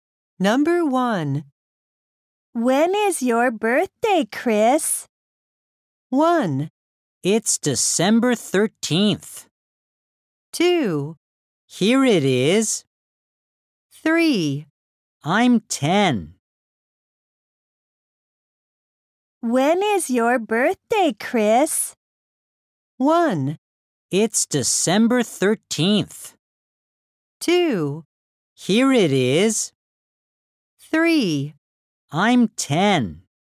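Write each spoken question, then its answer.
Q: When is your birthday, Chris?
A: 1: It's December 13th.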